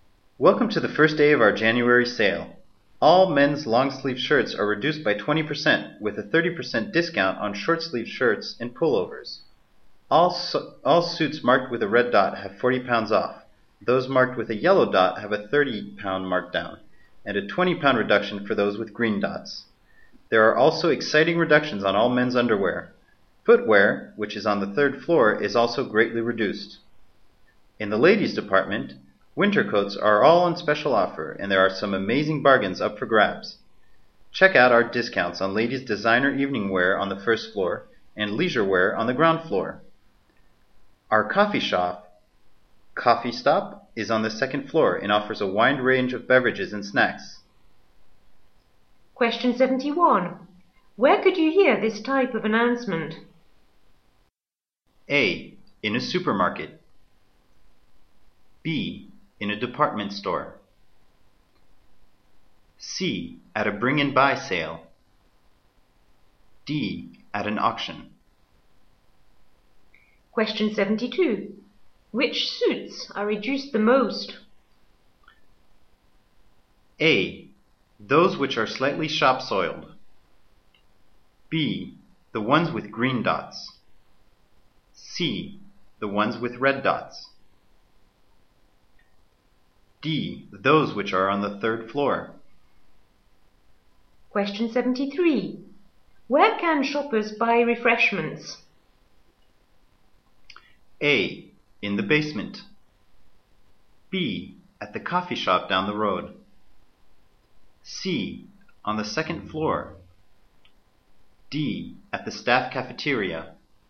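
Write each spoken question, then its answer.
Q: Where could you hear this type of announcement?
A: B: In a department store.

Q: Which suits are reduced the most?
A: C: The ones with red dots.

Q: Where can shoppers buy refreshments?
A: C: On the second floor.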